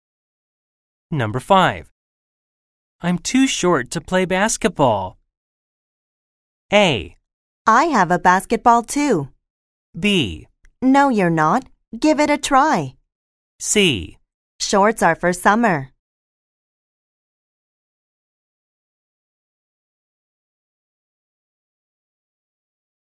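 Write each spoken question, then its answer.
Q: I'm too short to play basketball.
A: B: No, you're not. Give it a try.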